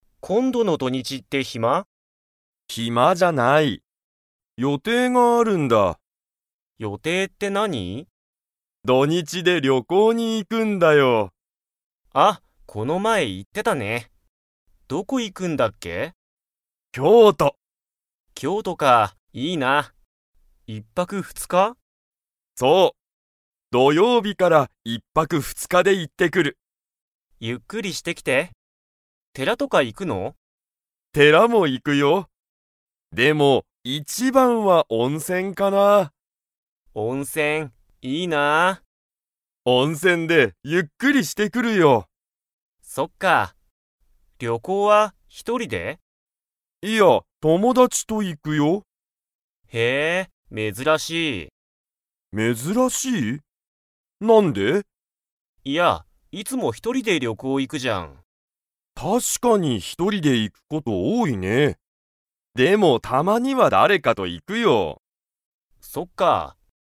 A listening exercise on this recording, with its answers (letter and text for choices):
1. ユウキは土日どにちにどこに行いきますか?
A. 会社かいしゃ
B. 京都きょうと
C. アメリカ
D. 大阪おおさか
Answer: B. 京都きょうと

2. ユウキは、今回こんかい一人ひとりで旅行りょこうに 。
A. 行いく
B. 行いかない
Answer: B. 行いかない

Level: Level 4